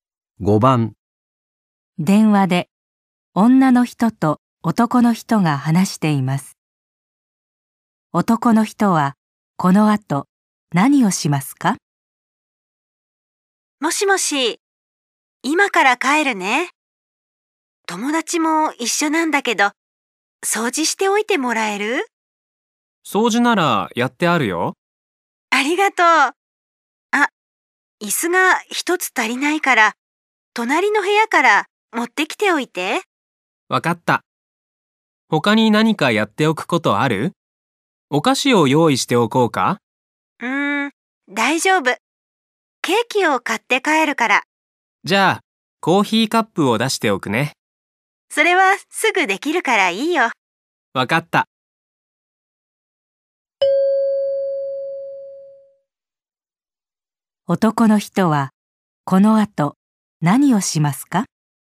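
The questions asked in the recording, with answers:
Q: 男の人はこの後何をしますか?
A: 隣の部屋から椅子を持ってくる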